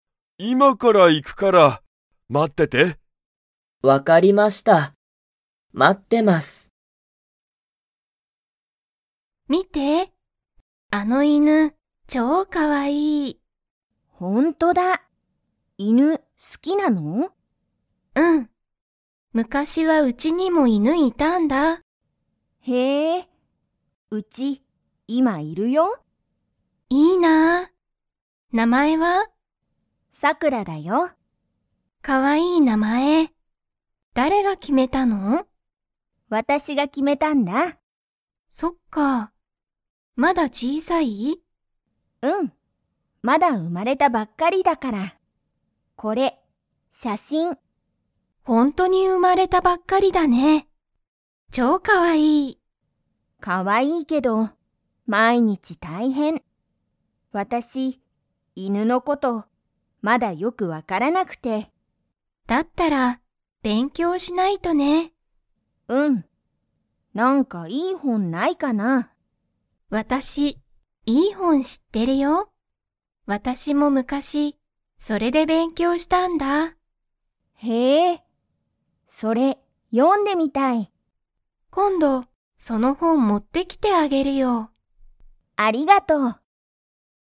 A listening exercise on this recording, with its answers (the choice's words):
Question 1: エリのうちには今(いま)、犬(いぬ)がいますか?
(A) はい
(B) いいえ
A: いいえ

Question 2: エリは昔むかし、犬いぬの事ことを____で勉強べんきょうした。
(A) 名前(なまえ)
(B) 写真(しゃしん)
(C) 事(こと)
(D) 本ほん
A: 本ほん

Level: Level 2